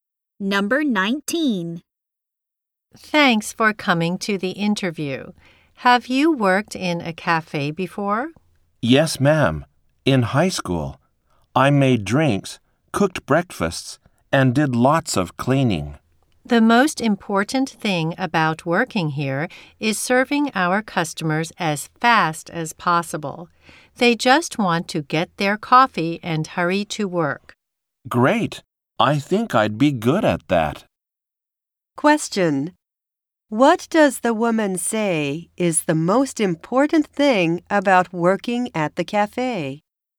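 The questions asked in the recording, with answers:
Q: What does the woman say is the most important thing about working at the cafe?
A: Serving customers as fast as possible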